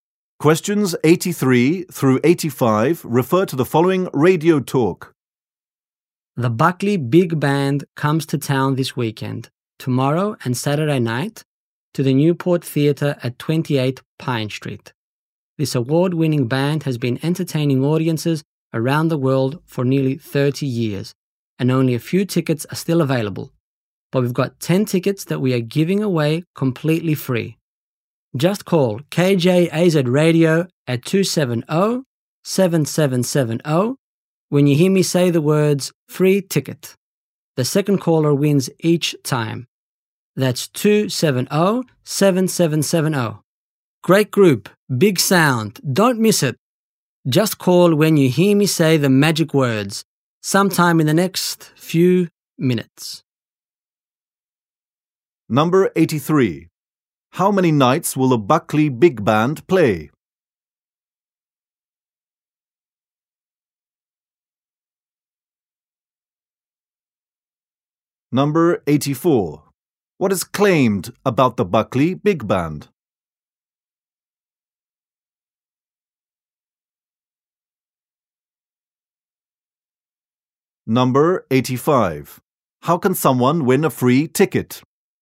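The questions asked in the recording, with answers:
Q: How many nights will the Buckley Big Band play?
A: Two

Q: How can someone win a free ticket?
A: Be the second caller after hearing the words free ticket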